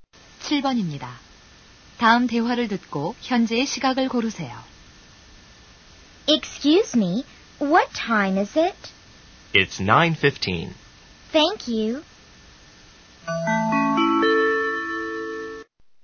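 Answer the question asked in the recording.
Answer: 9시 15분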